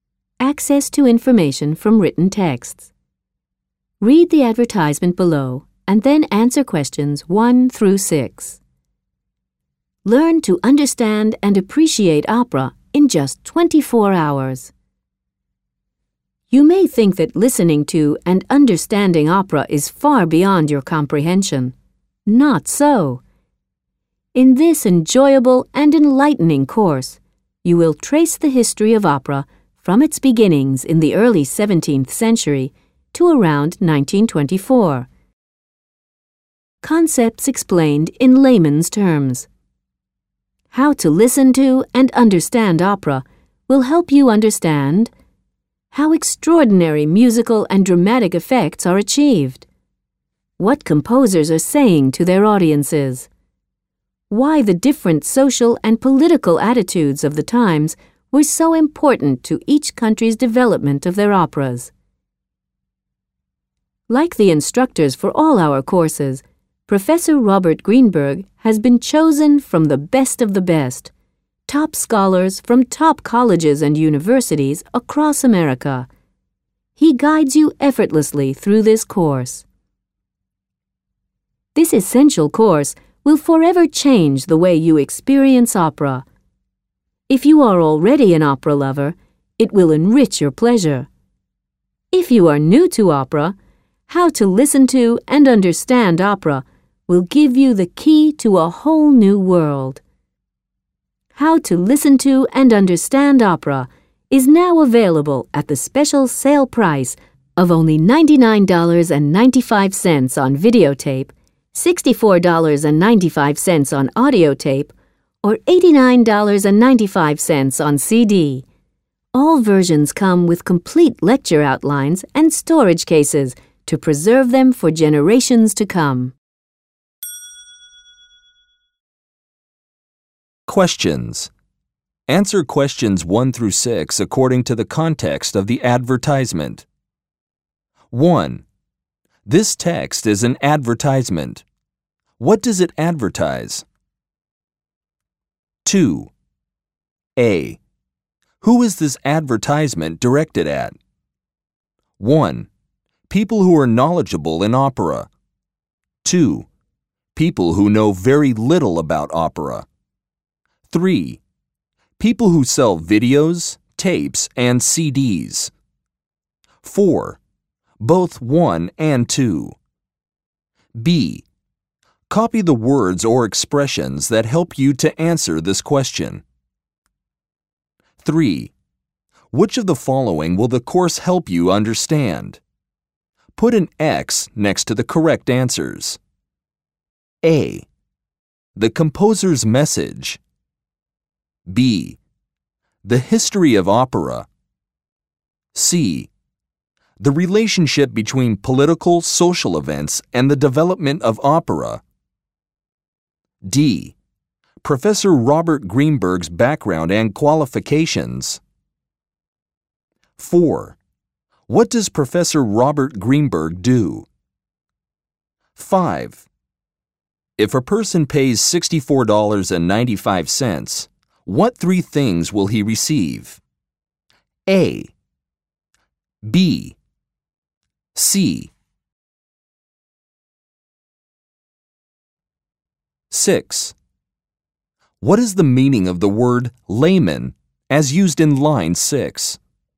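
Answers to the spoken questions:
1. A course on how to listen to and understand opera
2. 4: Both 1 and 2
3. A: The composer's message; B: The history of opera; C: The relationship between political, social events and the development of opera
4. He teaches (guides you through) the course; he is a top scholar
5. The course on audio tape, complete lecture outlines, and storage cases
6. A non-expert; an ordinary person without specialist knowledge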